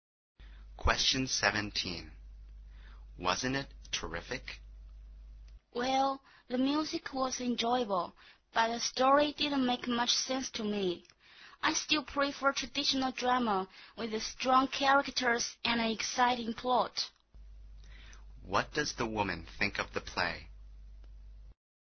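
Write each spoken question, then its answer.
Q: What does the woman think of the play?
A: The music was enjoyable but the story didn't make much sense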